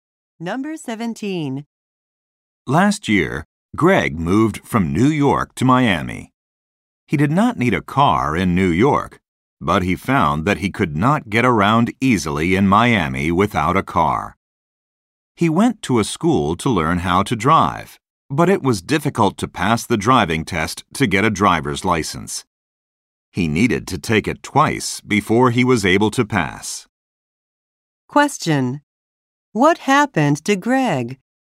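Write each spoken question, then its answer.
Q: What happened to Greg?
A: He had to take the driving test twice.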